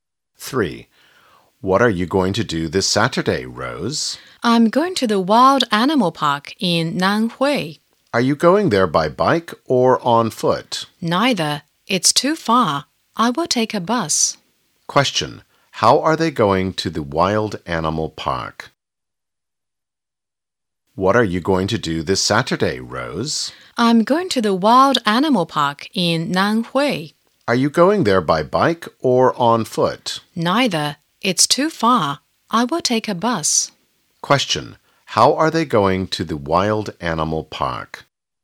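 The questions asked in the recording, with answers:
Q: Question. How are they going to the wild animal park?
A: By bus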